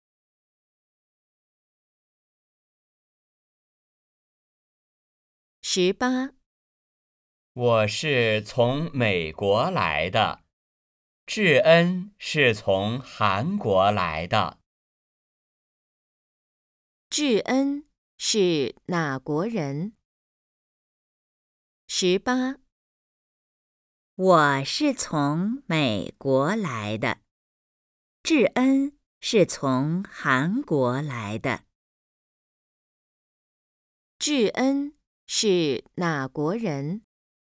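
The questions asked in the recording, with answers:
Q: 智恩是哪国人?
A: 韩国人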